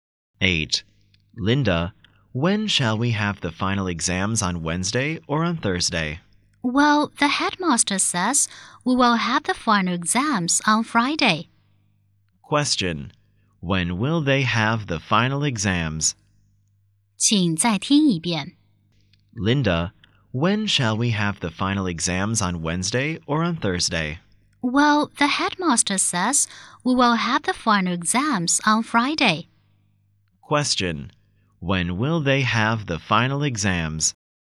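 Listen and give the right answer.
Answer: On Friday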